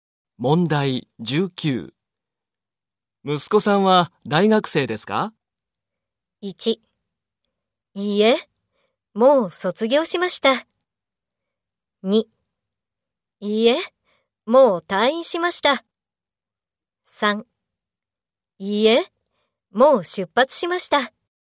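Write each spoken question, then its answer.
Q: 息子さんは大学生ですか?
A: 1: いいえ、もう卒業しました。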